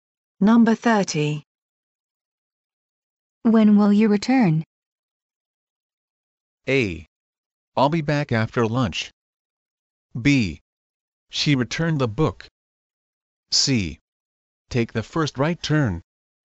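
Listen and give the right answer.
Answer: A: I'll be back after lunch.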